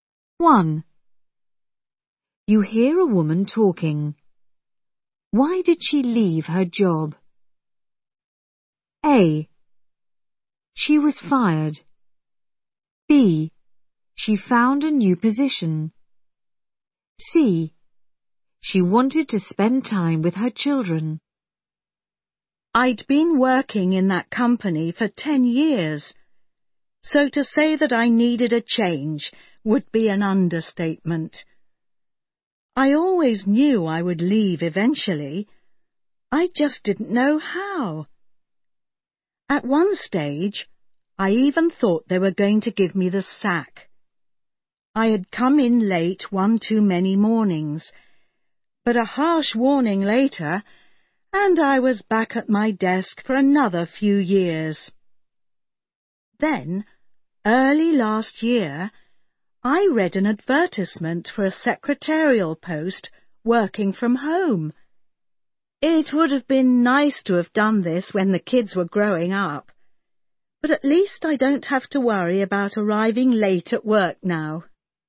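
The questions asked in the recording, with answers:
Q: Why did she leave her job?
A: B: She found a new position.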